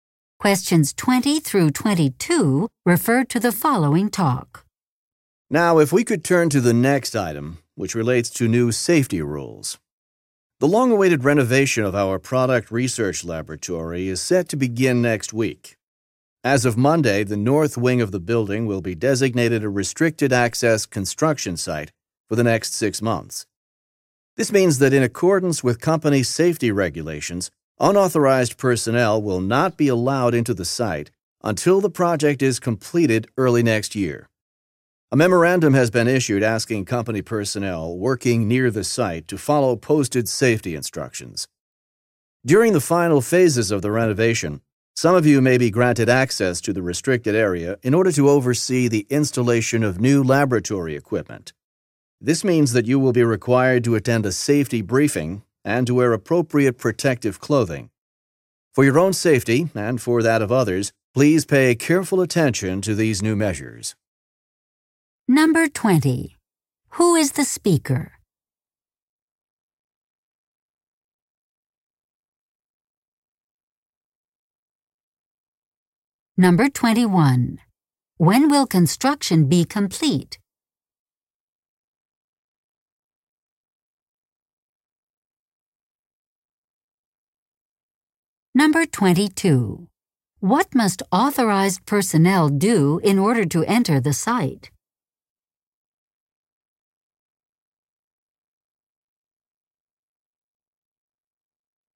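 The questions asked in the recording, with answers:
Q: When will construction be complete?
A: Early next year

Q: What must authorized personnel do in order to enter the site?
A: Attend a safety briefing and wear protective clothing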